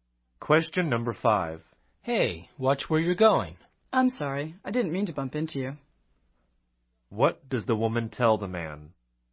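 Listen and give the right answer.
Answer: She is sorry; she bumped into him by accident.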